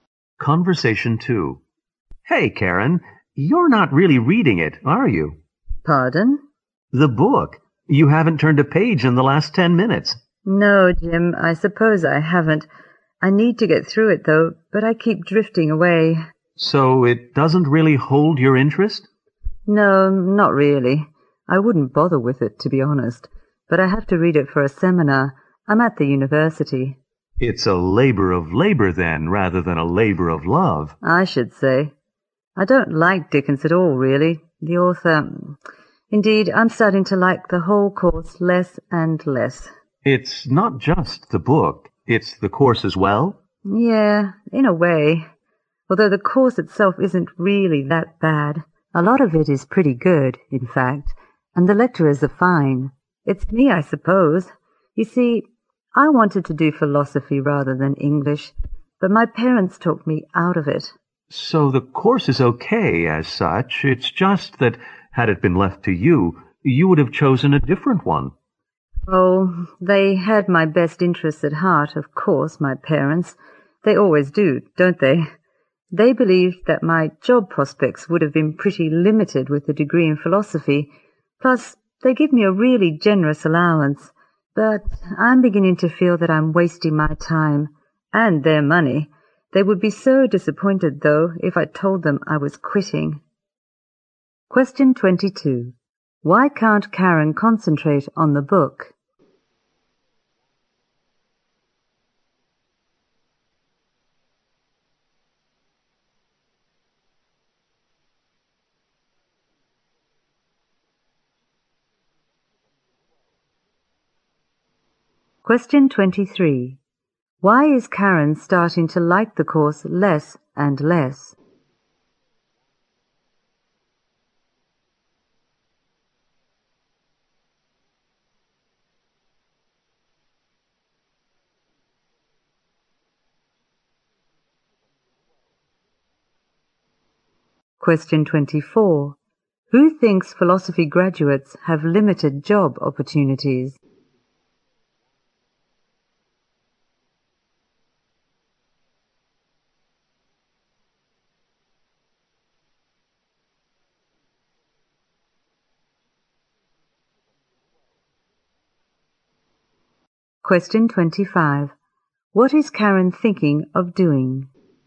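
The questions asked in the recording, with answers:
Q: Why can't Karen concentrate on the book?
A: It doesn't hold her interest.

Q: Why is Karen starting to like the course less and less?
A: She wanted to study philosophy instead.

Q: Who thinks philosophy graduates have limited job opportunities?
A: Karen's parents

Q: What is Karen thinking of doing?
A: Quitting the course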